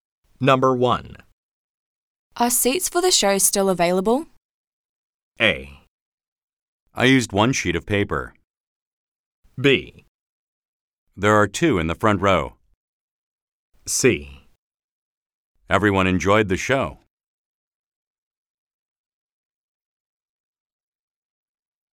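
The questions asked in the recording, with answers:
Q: Are seats for the show still available?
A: B: There are two in the front row.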